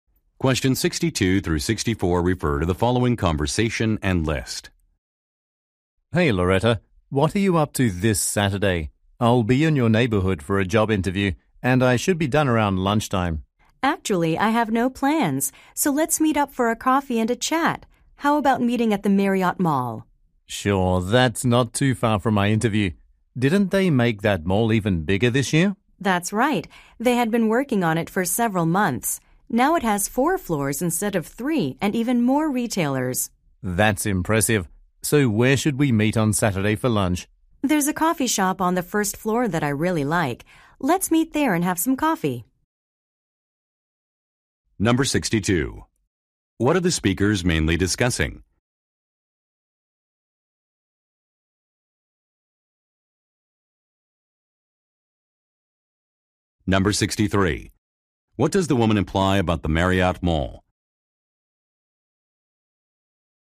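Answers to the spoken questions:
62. Meeting up on Saturday
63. It has been expanded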